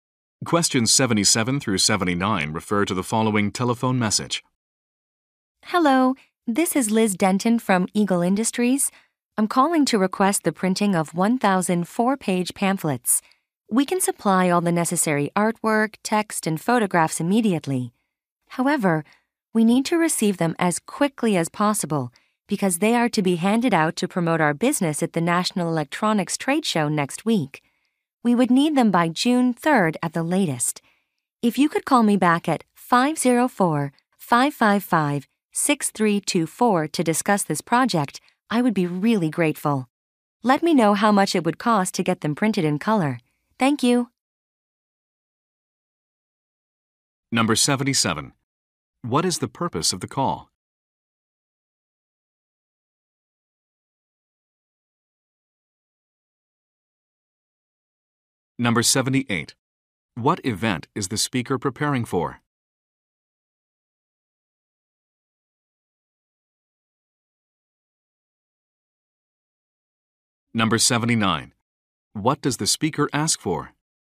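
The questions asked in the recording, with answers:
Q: What is the purpose of the call?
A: To request printing of 1,000 pamphlets

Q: What event is the speaker preparing for?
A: The National Electronics Trade Show

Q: What does the speaker ask for?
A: A price for color printing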